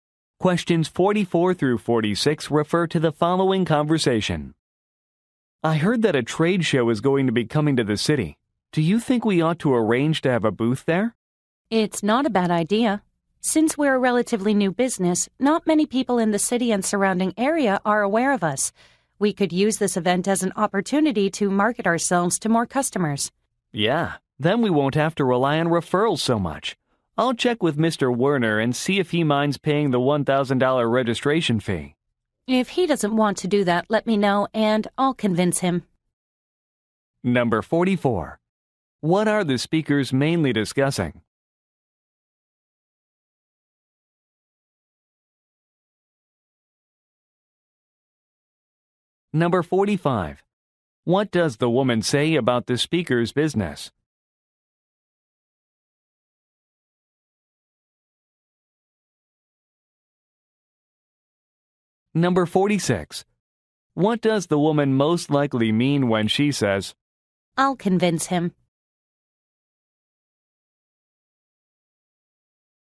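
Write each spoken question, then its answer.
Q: What are the speakers mainly discussing?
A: Having a booth at a trade show

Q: What does the woman say about the speaker's business?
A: It is relatively new and not well known

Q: What does the woman most likely mean when she says,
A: She will persuade Mr. Werner to pay the registration fee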